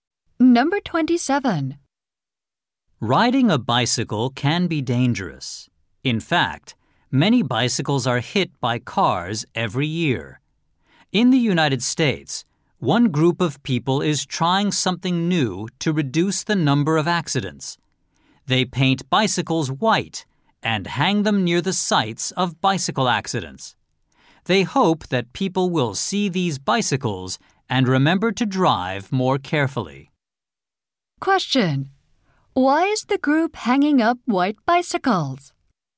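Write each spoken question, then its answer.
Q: Why is the group hanging up white bicycles?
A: To remind drivers to drive more carefully.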